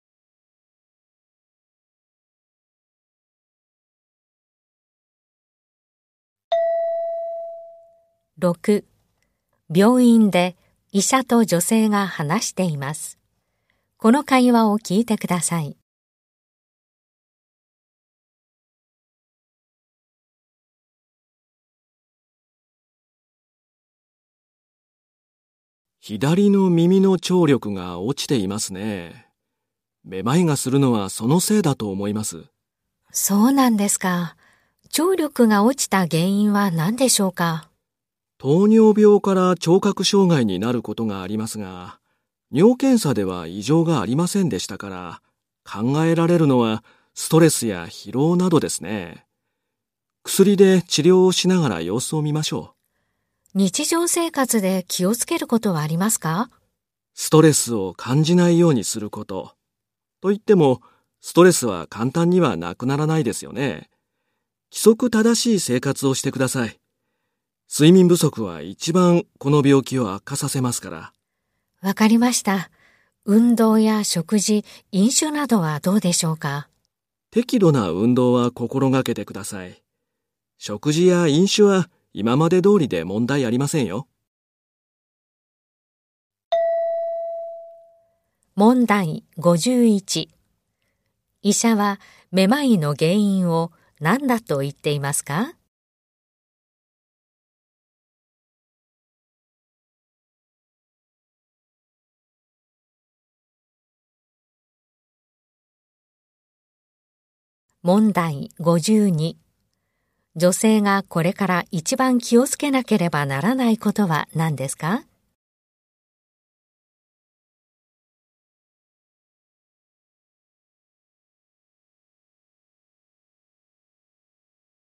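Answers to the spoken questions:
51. 左耳の聴力が落ちていること
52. 睡眠不足にならないよう規則正しい生活をすること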